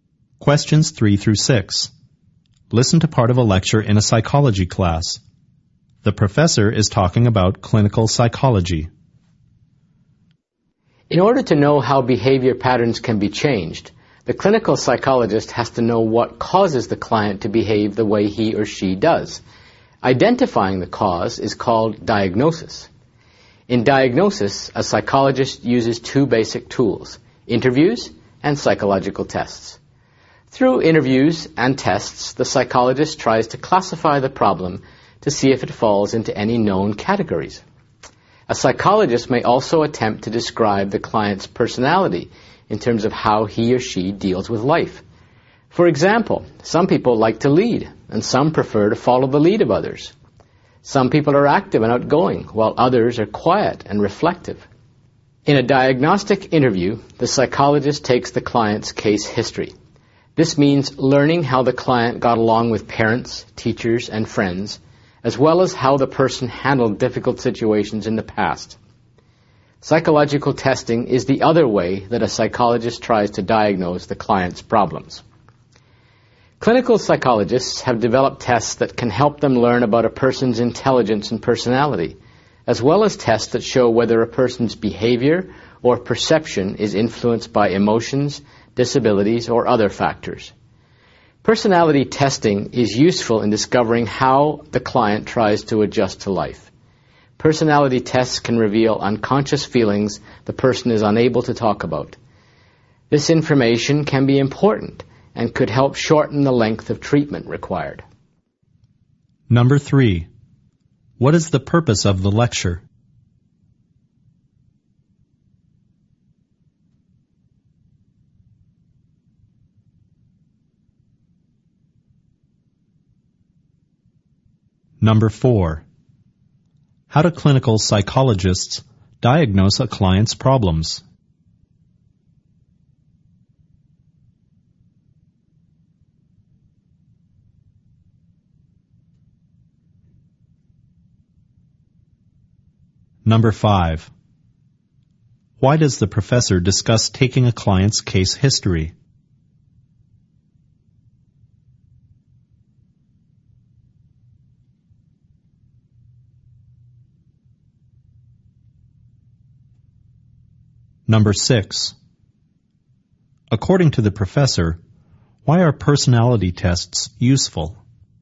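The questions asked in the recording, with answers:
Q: what is the purpose of the lecture?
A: To explain how clinical psychologists diagnose clients' problems

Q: how do clinical psychologists diagnose a client's problems?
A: Through interviews and psychological tests

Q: why does the professor discuss taking a client's case history?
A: To show how the interview reveals how the client related to others and handled difficult situations

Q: According to the professor, why are personality tests useful?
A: They show how the client adjusts to life and reveal unconscious feelings, which can shorten treatment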